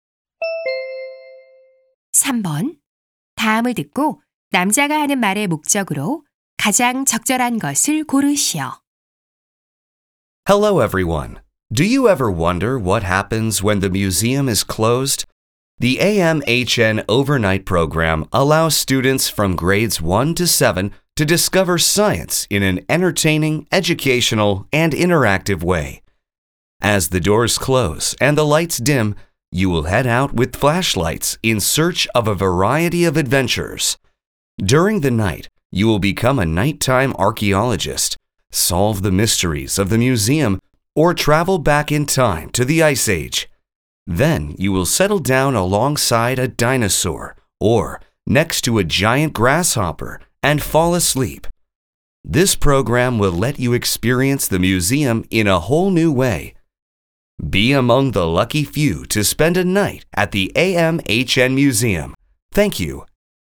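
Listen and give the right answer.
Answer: 박물관 야간 프로그램(AMHN overnight program)을 홍보하려고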